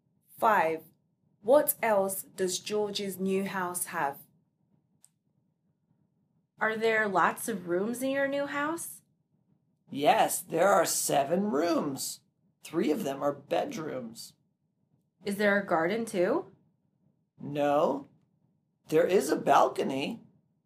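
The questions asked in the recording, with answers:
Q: What else does George's new house have?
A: A balcony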